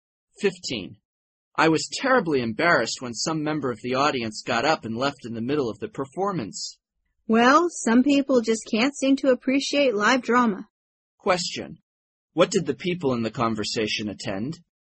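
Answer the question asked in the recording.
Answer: A live drama (a play).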